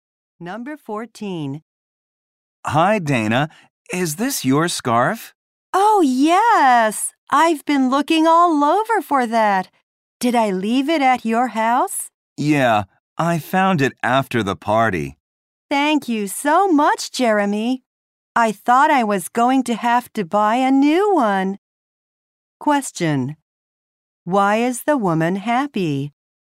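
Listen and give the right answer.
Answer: Jeremy found her scarf.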